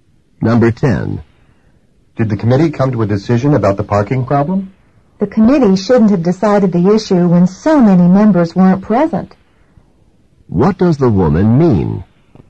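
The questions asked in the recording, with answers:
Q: What does the woman mean?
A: The committee should not have made a decision with so many members absent.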